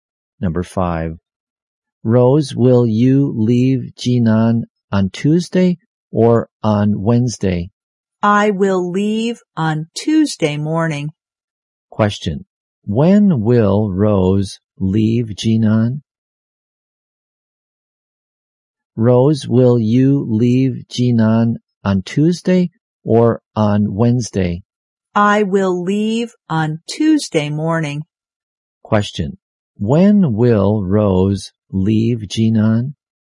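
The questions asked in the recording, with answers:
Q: When will Rose leave Jinan?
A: On Tuesday morning.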